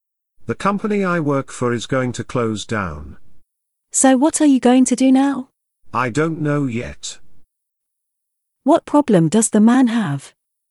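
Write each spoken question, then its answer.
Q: What problem does the man have?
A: His company is going to close down.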